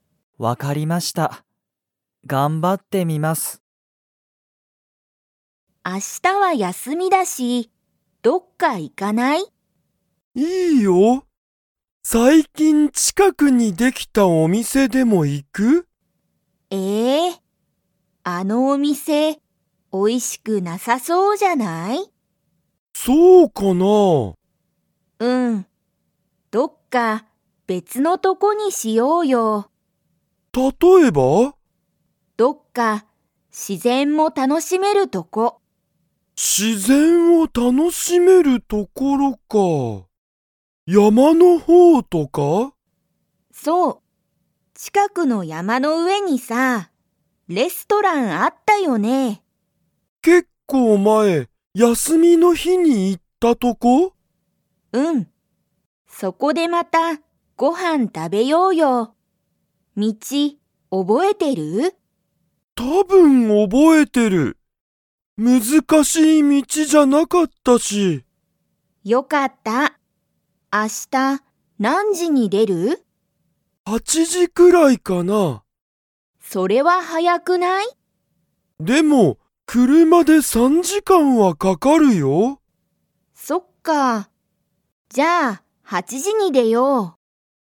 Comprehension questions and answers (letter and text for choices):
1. ユウヤとサキは、最近さいきんできたお店みせに行いきますか?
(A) はい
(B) いいえ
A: (B) いいえ

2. ____に、レストランがある。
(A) 近ちかくの山やまの上うえ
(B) 結構前けっこうまえの道みち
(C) 別べつの町まち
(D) 難むずかしい道みちの先さき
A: (A) 近ちかくの山やまの上うえ

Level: Level 2